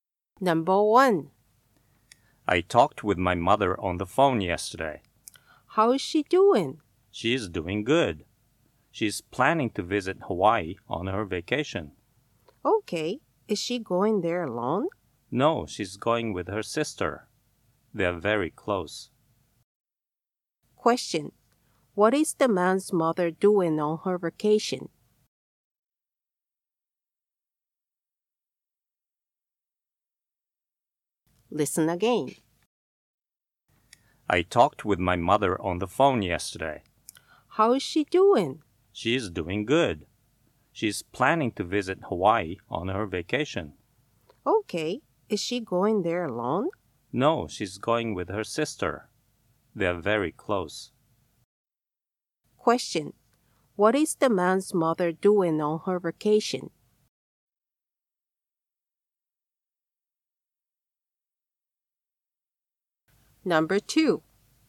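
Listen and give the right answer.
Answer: Visiting Hawaii with her sister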